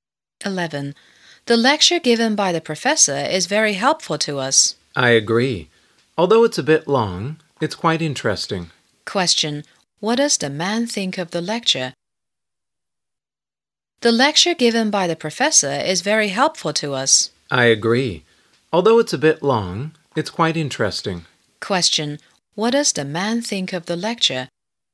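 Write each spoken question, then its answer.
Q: Question. What does the man think of the lecture?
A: Long but interesting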